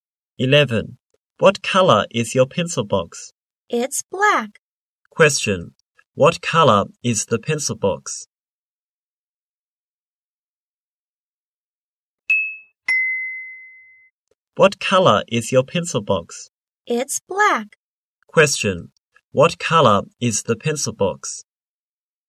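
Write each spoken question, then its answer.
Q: What color is the pencil box?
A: Black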